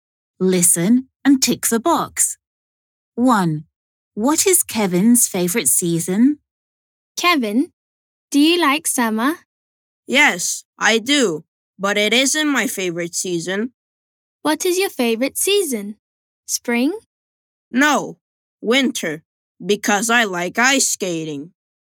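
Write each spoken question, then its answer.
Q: What is Kevin's favorite season?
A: winter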